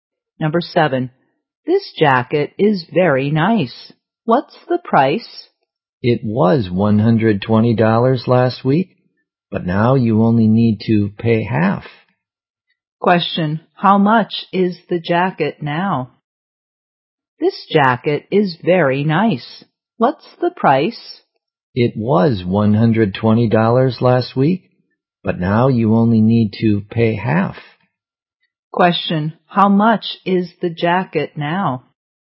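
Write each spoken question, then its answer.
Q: how much is the jacket now?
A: $60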